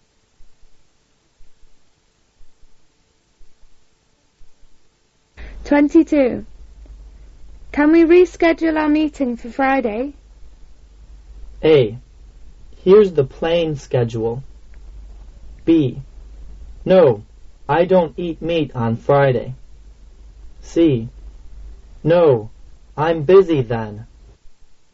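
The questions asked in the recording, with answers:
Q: Can we reschedule our meeting for Friday?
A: C: No, I'm busy then.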